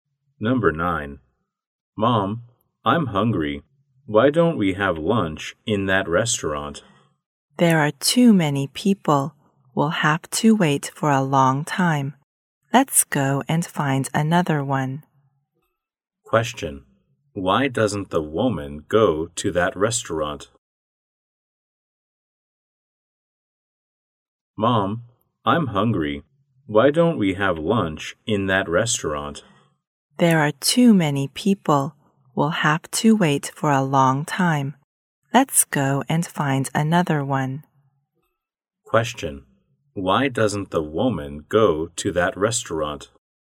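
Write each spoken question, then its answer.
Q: Why doesn't the woman go to that restaurant?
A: There are too many people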